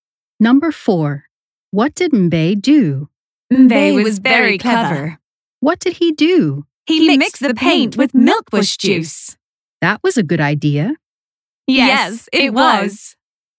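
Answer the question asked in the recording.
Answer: He mixed the paint with milkbush juice.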